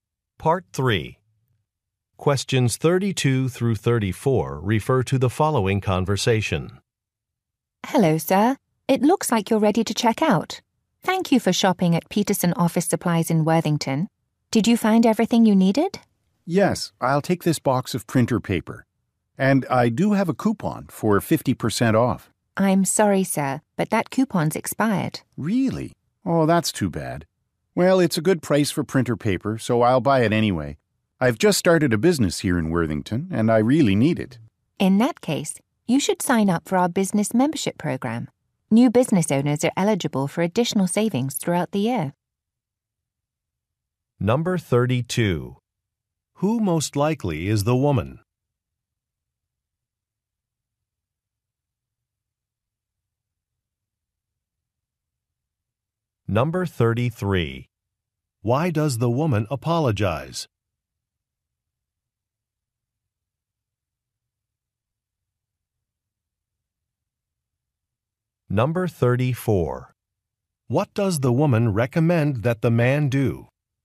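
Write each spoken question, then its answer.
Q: Who most likely is the woman?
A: A cashier at an office supply store

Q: Why does the woman apologize?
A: The man's coupon has expired

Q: What does the woman recommend that the man do?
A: Sign up for the business membership program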